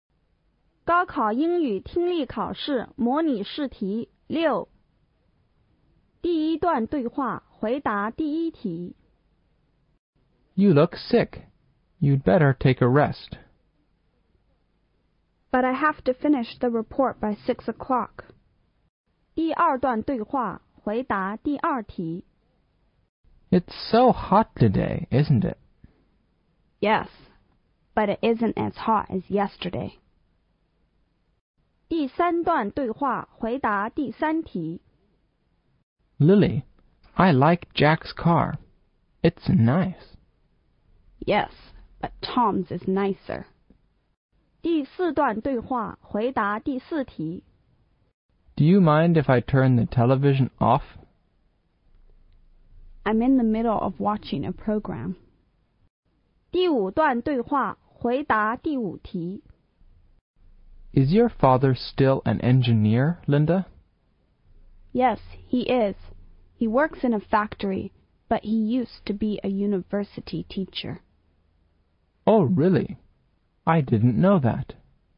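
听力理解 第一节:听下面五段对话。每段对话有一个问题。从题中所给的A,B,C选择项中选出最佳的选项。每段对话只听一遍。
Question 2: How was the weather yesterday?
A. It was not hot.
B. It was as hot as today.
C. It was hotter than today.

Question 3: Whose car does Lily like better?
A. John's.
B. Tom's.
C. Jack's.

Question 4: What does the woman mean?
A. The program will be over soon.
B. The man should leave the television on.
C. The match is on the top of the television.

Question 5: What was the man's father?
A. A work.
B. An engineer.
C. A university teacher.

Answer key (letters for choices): 2C, 3B, 4B, 5C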